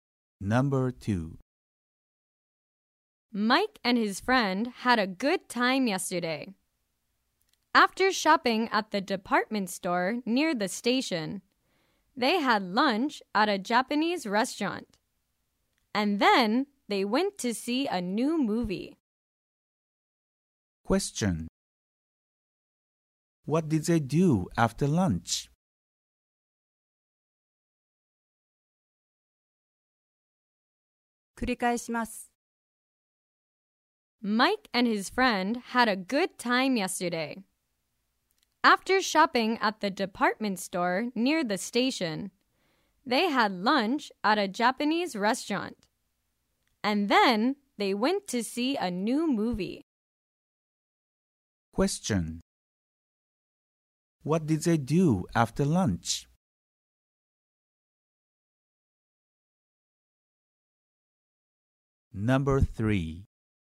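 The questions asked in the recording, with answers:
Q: What did they do after lunch?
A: They went to see a new movie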